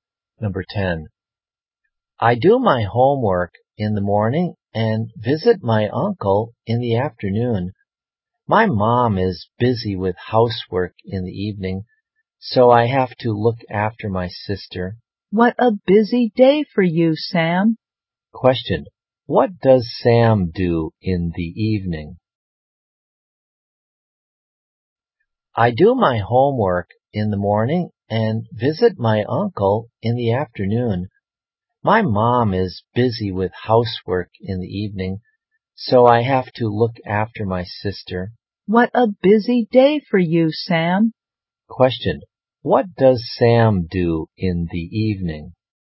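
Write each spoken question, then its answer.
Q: What does Sam do in the evening?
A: He looks after his sister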